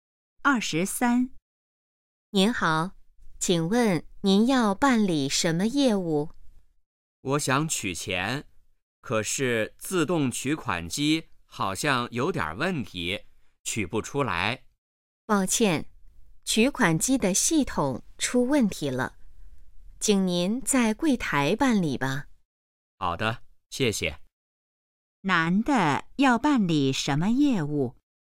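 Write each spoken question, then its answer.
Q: 男的要办理什么业务?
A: 取钱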